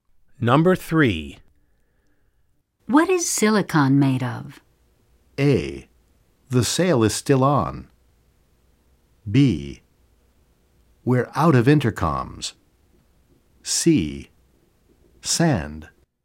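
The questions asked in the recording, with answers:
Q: What is silicon made of?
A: C: Sand.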